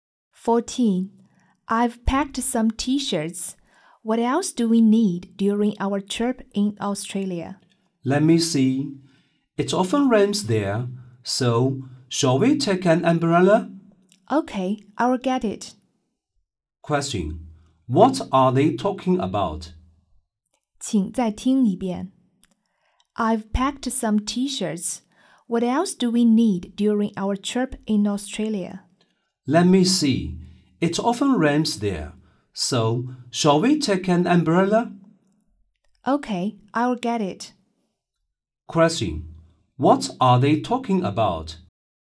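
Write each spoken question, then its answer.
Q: Question: What are they talking about?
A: What to take on their trip to Australia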